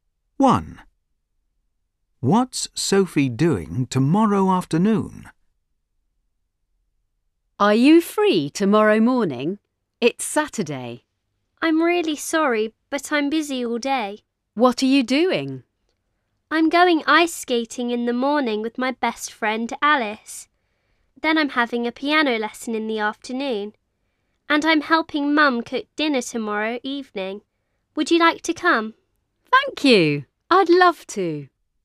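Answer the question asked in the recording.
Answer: having a piano lesson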